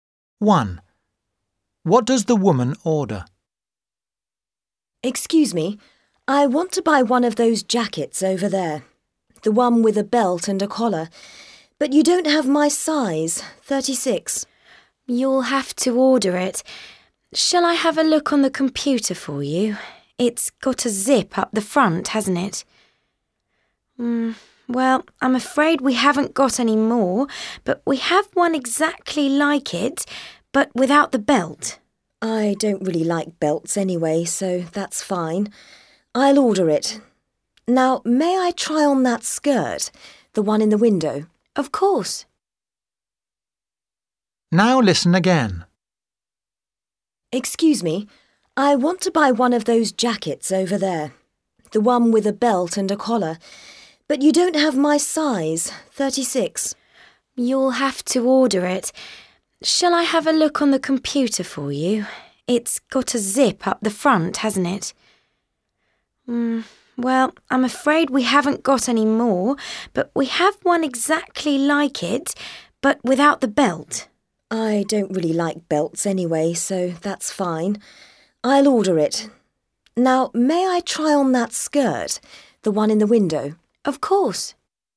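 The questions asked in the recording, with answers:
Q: What does the woman order?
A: a jacket with a collar and zip but no belt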